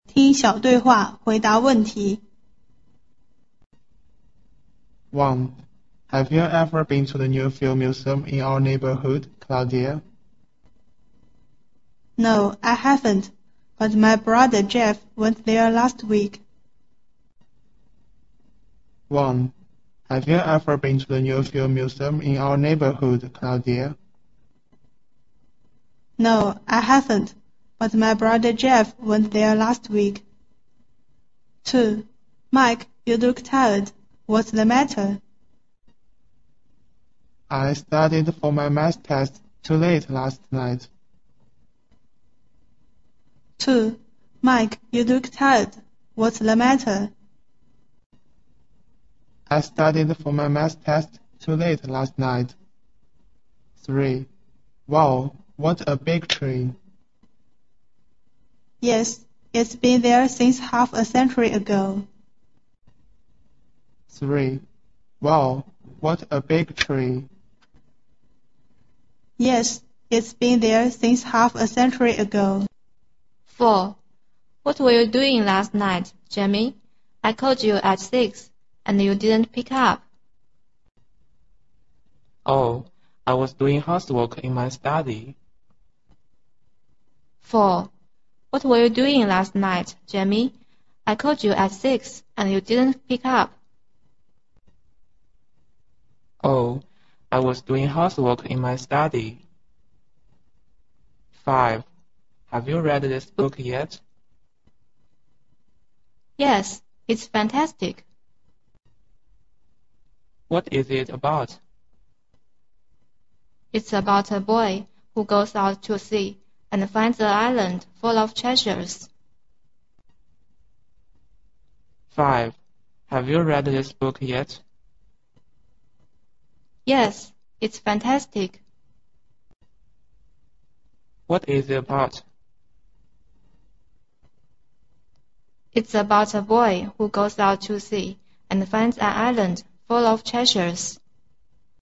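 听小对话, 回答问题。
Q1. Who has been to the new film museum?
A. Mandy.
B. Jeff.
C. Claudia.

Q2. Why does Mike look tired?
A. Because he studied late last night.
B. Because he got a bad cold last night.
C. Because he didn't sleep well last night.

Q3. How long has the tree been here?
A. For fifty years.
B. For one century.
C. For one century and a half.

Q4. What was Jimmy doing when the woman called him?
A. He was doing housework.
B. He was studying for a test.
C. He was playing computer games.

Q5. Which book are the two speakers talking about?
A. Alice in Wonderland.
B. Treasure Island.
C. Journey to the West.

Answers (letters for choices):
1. B
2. A
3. A
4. A
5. B

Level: 八年级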